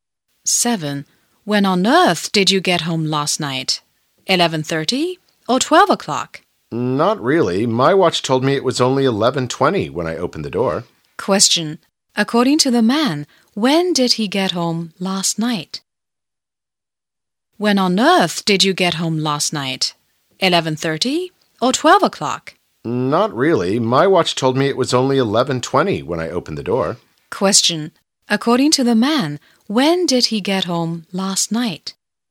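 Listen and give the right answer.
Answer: At 11:20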